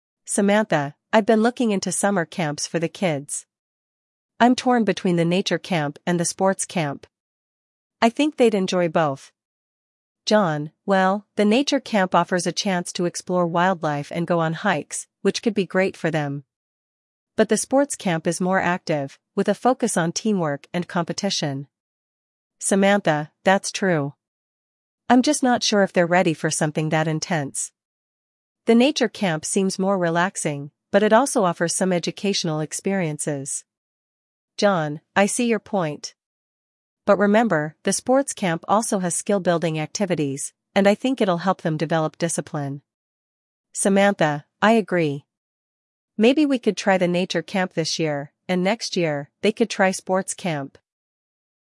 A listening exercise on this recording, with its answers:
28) What are the two summer camps Samantha and John are considering?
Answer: The nature camp and the sports camp.

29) What does the nature camp offer?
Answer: Wildlife exploration and hikes.

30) What is the main focus of the sports camp?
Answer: Teamwork and competition.

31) What aspect of the sports camp does John emphasize?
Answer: Skill-building and discipline.

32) What is Samantha's suggestion for this year?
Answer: Try the nature camp this year.

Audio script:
Samantha: I've been looking into summer camps for the kids. I'm torn between the nature camp and the sports camp. I think they'd enjoy both.
John: Well, the nature camp offers a chance to explore wildlife and go on hikes, which could be great for them. But the sports camp is more active, with a focus on teamwork and competition.
Samantha: That's true. I'm just not sure if they're ready for something that intense. The nature camp seems more relaxing, but it also offers some educational experiences.
John: I see your point. But remember, the sports camp also has skill-building activities, and I think it'll help them develop discipline.
Samantha: I agree. Maybe we could try the nature camp this year, and next year, they could try sports camp.